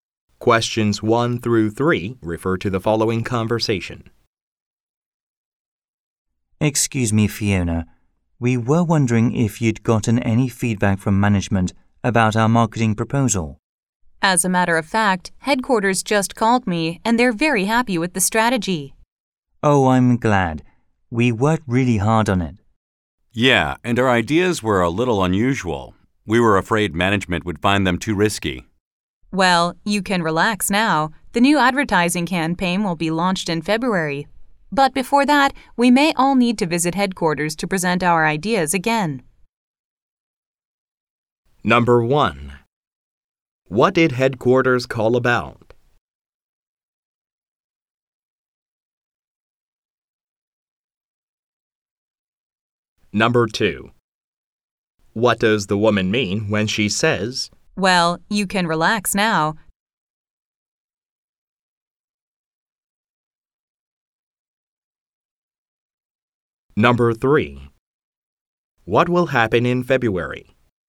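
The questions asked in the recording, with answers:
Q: What did headquarters call about?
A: A marketing proposal

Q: What does the woman mean when she says, "Well, you can relax now"?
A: Management approved the unusual ideas

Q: What will happen in February?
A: A new advertising campaign will be launched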